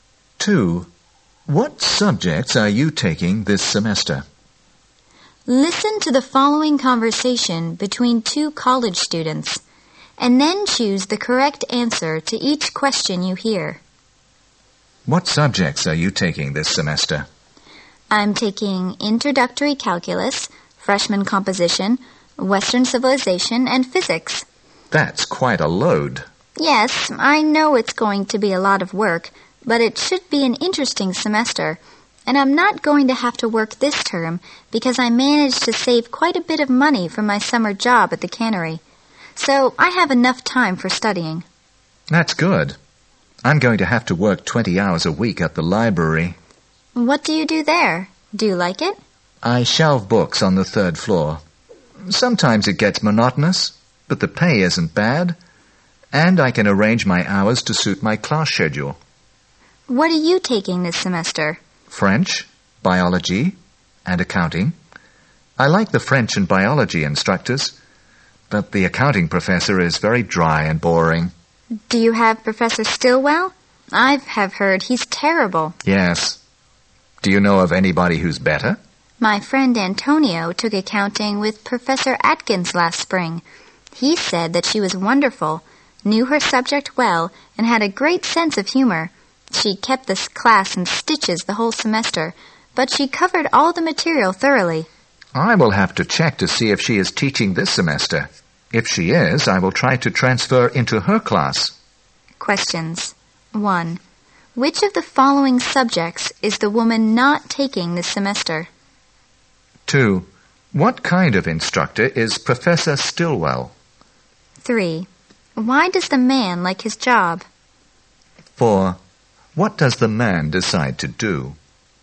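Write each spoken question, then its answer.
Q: What kind of instructor is Professor Stillwell?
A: Dry and boring (said to be terrible)

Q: Why does the man like his job?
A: The pay isn't bad and he can arrange his hours to suit his class schedule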